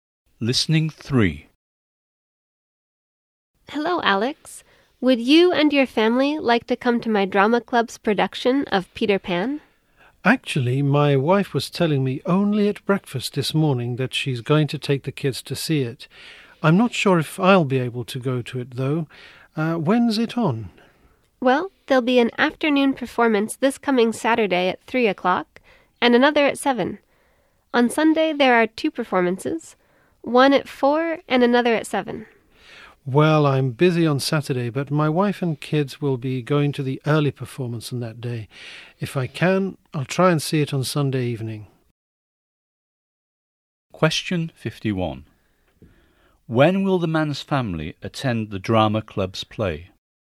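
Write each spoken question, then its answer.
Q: When will the man's family attend the drama club's play?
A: Saturday at 3 o'clock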